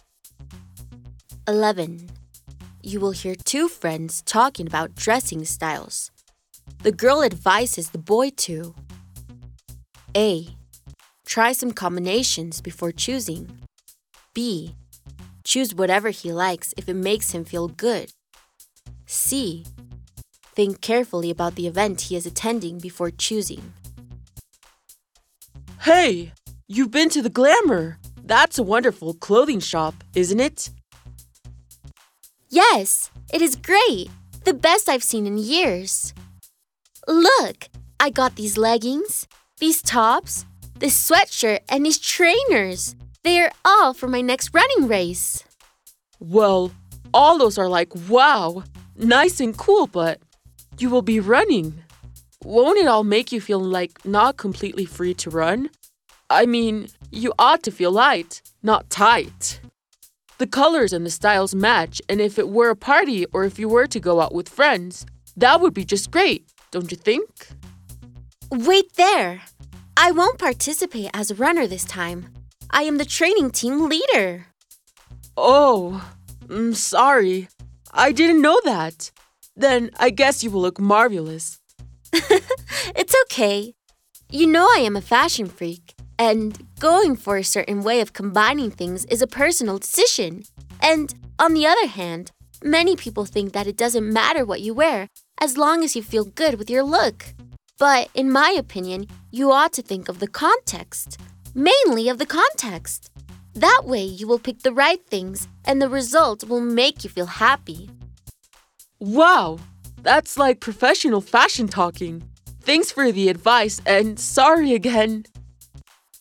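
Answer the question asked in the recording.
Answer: C: Think carefully about the event he is attending before choosing.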